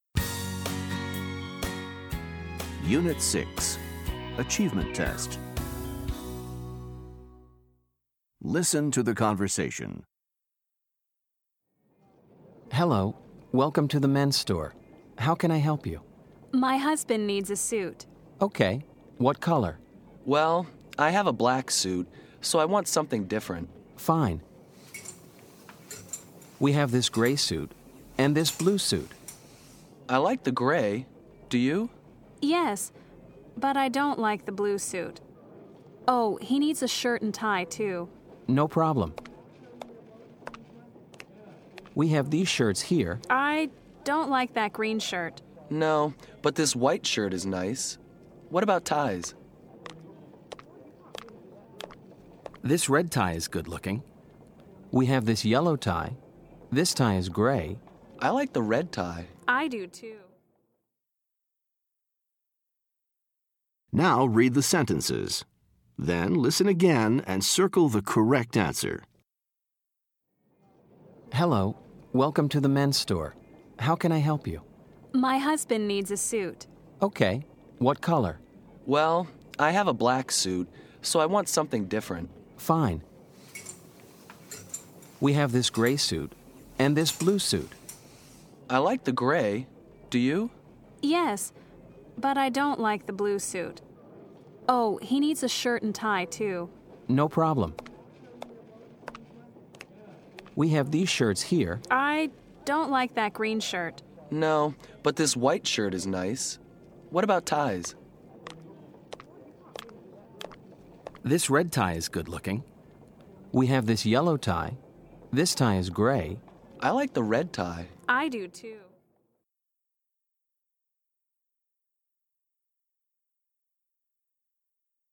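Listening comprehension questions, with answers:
Listen to the conversations. Read the sentences. Then listen again and circle the correct answer for each statement.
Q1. The man has a .......... suit.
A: black

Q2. The man and the woman .............. the gray suit.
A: like

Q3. The woman doesn't like the ............ suit.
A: blue

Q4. The woman ............ the green shirt.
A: doesn't like

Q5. The man likes the ............ shirt.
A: white

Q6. The red tie is ............ .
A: good looking

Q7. The man likes the ............ tie.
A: red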